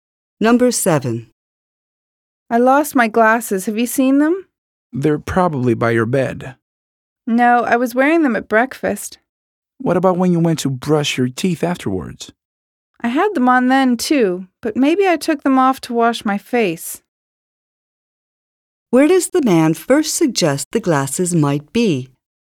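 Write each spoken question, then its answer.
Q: Where does the man first suggest the glasses might be?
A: By the bed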